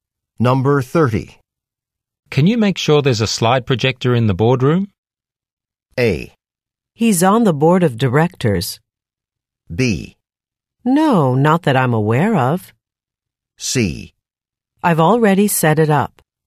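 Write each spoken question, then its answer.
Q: Can you make sure there's a slide projector in the boardroom?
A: C: I've already set it up.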